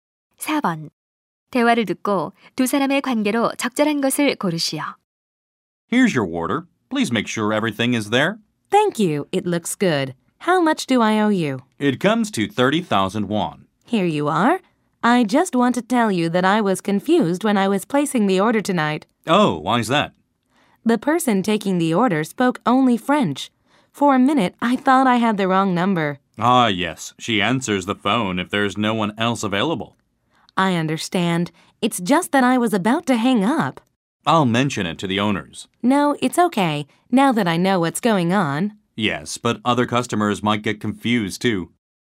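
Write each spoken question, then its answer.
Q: 대화를 듣고 두 사람의 관계로 적절한 것을 고르시오.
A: 음식 배달원 - 손님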